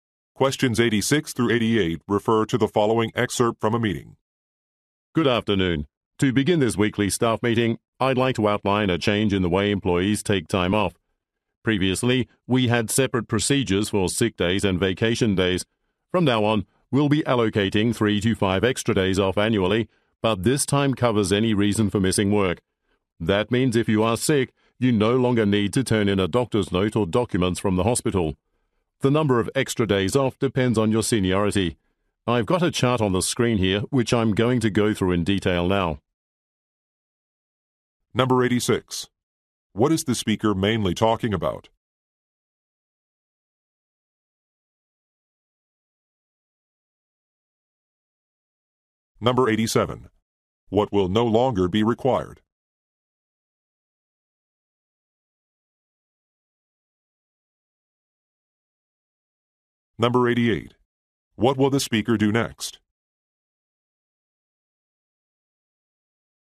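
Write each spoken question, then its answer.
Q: What is the speaker mainly talking about?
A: A change in the time-off policy

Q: What will no longer be required?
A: A doctor's note or hospital documents

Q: What will the speaker do next?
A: Go through a chart in detail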